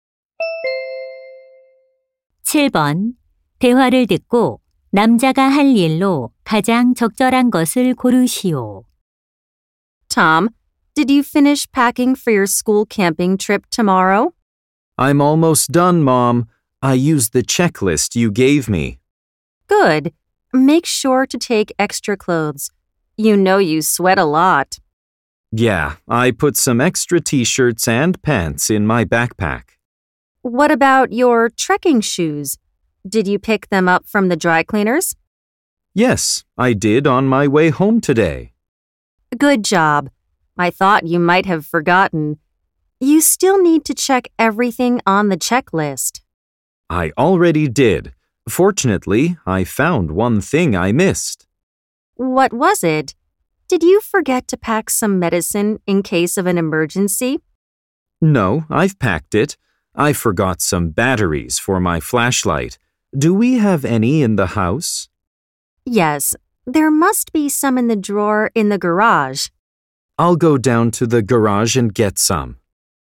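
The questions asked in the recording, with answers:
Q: 대화를 듣고 남자가 할 일로 가장 적절한 것을 고르시오.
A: 차고에서 손전등 건전지 가져오기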